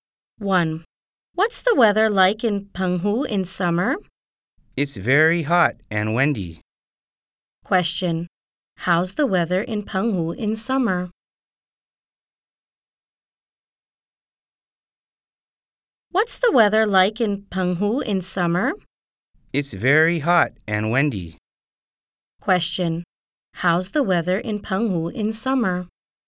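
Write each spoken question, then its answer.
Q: How's the weather in Penghu in summer?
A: Very hot and windy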